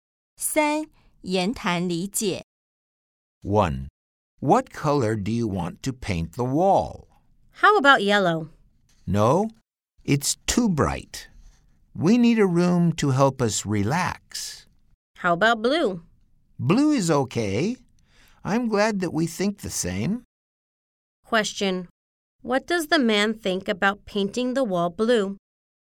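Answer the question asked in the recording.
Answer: He thinks it is okay; they agree.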